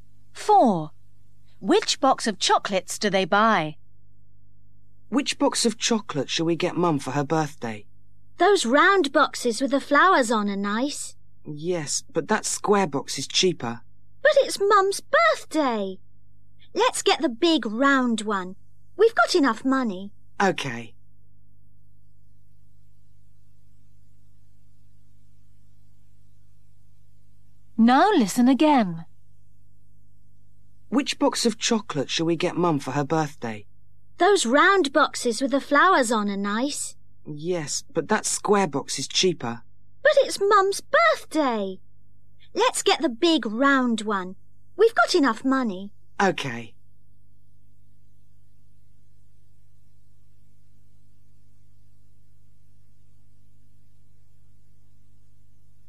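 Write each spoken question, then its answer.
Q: Which box of chocolates do they buy?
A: the big round one with flowers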